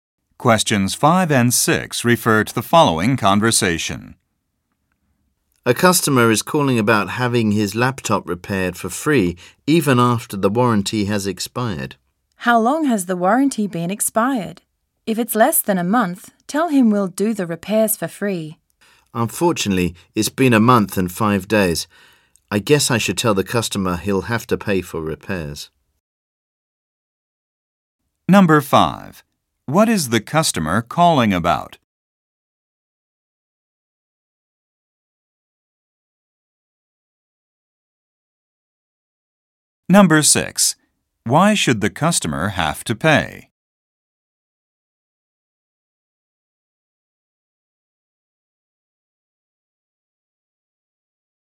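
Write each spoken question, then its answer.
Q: What is the customer calling about?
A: Getting his laptop repaired for free after the warranty expired

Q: Why should the customer have to pay?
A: The warranty expired more than a month ago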